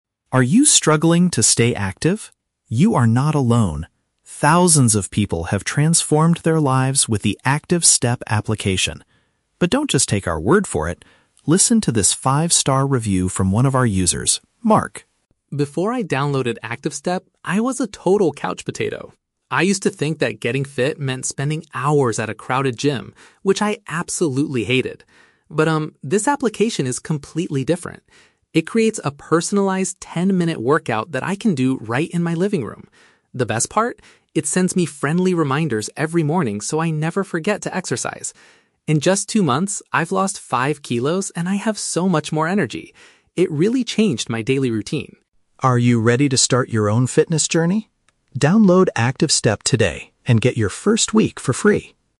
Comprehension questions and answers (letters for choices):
Listen to an audio advertisement for a fitness app. Choose the correct answer (A, B, or C).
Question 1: Why did Mark dislike the idea of getting fit in the past?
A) He did not want to exercise with a lot of other people.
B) He believed that fitness programs were too expensive.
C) He did not have ten minutes of free time in his schedule.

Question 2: What specific feature of the app does Mark like the most?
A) The video calls with personal trainers.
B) The healthy meal plans for losing weight.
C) The daily morning notifications.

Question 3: What does the narrator offer at the end of the advertisement?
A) A fifty percent discount on a yearly membership.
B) Seven days of using the app without paying.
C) A free piece of exercise equipment for the living room.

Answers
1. A
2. C
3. B

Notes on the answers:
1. Mark says he used to think getting fit meant spending hours at a "crowded gym," which he "absolutely hated." A crowded place is a place with a lot of other people.
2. Mark says "The best part" is that the app sends him "friendly reminders every morning." A "reminder" sent by an app is paraphrased as a "notification" in B1 vocabulary.
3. The narrator tells the audience to download the app today and "get your first week for free." "A week" equals seven days, and "for free" means without paying.

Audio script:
Narrator: Are you struggling to stay active? You are not alone. Thousands of people have transformed their lives with the ActiveStep application. But don't just take our word for it. Listen to this five-star review from one of our users, Mark.
Mark: Before I downloaded ActiveStep, I was a total couch potato. I used to think that getting fit meant spending hours at a crowded gym, which I absolutely hated. But, um, this application is completely different. It creates a personalized ten-minute workout that I can do right in my living room. The best part? It sends me friendly reminders every morning so I never forget to exercise. In just two months, I've lost five kilos and I have so much more energy. It really changed my daily routine.
Narrator: Are you ready to start your own fitness journey? Download ActiveStep today and get your first week for free!